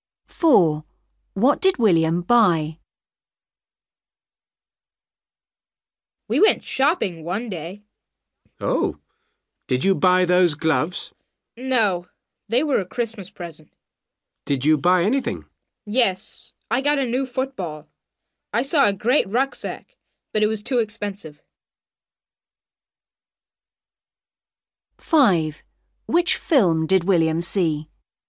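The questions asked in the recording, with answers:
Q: What did William buy?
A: A new football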